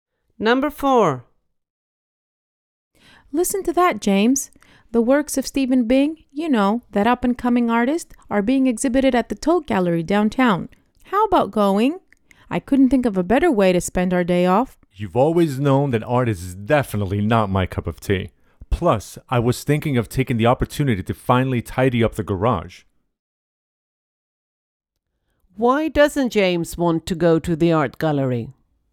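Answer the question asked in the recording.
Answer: He doesn't like art and wants to tidy up the garage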